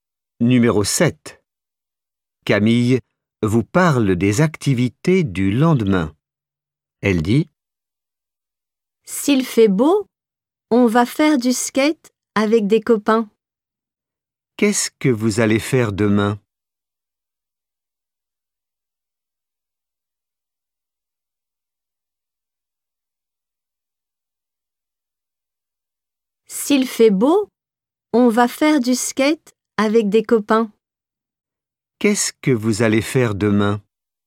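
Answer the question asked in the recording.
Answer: Du skate avec des copains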